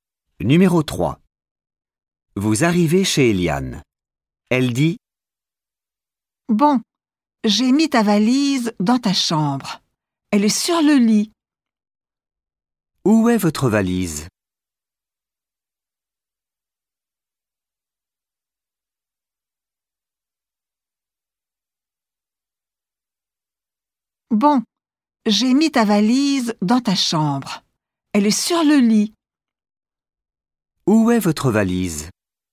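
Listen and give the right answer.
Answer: Sur le lit, dans la chambre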